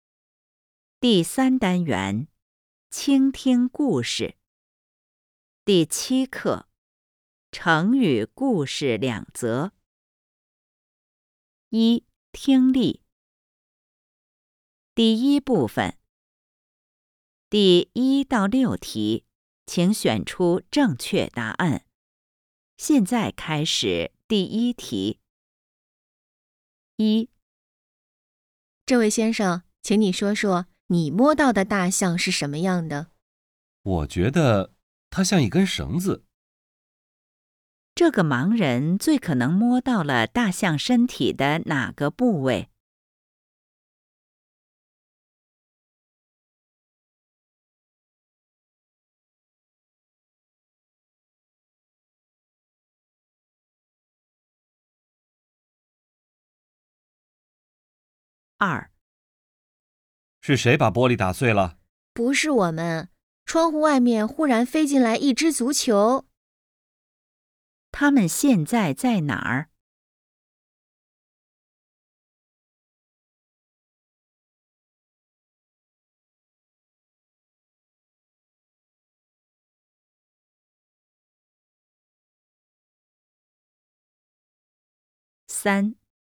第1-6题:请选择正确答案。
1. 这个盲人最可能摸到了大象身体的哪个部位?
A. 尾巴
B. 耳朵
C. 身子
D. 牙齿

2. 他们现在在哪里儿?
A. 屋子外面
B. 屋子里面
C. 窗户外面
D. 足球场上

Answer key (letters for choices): 1A, 2B

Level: HSK 5